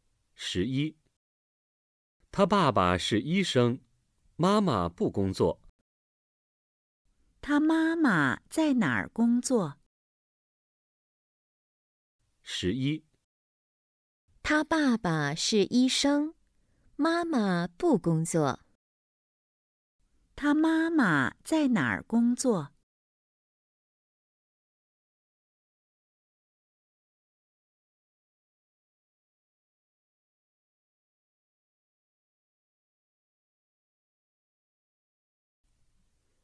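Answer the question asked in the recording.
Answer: 她不工作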